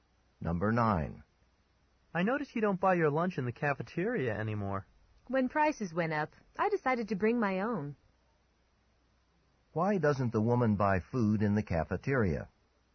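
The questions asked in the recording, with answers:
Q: Why doesn't the woman buy food in the cafeteria?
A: The prices went up, so she brings her own lunch.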